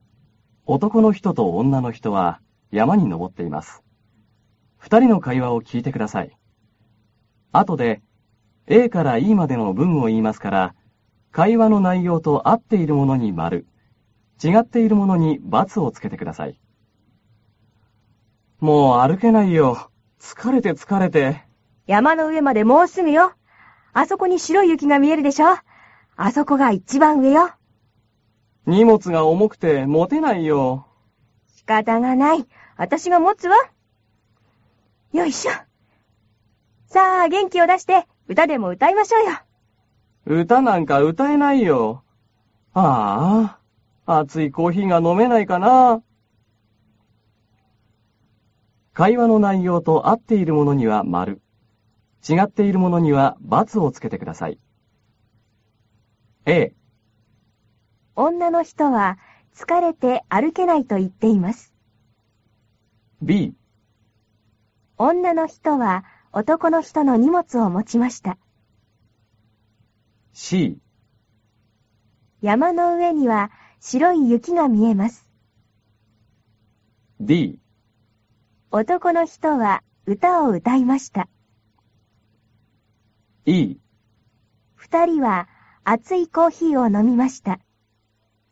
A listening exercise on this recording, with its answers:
会話の内容に合っているものに〇、ちがっているものに✕をつけてください。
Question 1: 女の人は男の人の荷物を持ちました。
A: 〇

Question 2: 山の上には、白い雪が見えます。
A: 〇

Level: cơ bản